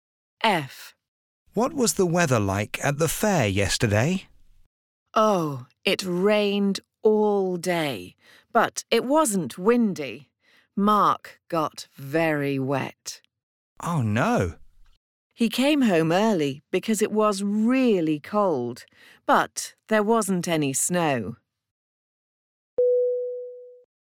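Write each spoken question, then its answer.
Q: What was the weather like at the fair yesterday?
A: Rainy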